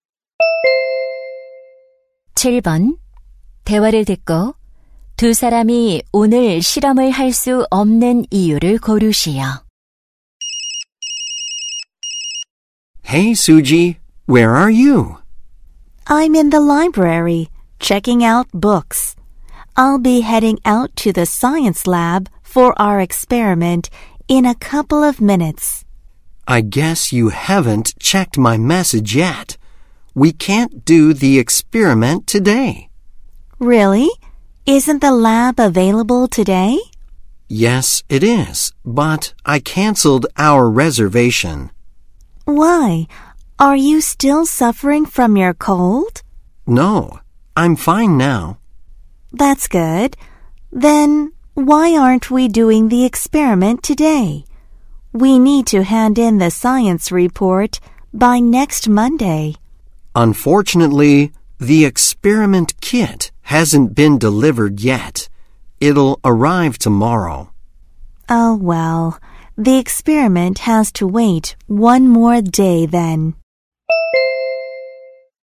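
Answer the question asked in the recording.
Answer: 실험 키트가 아직 배달되지 않아서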